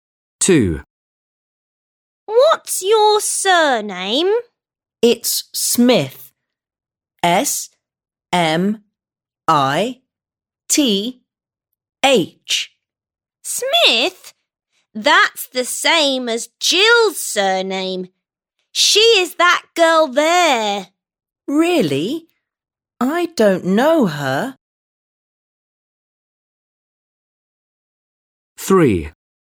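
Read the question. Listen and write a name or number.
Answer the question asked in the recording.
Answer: Smith

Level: 3. Sınıf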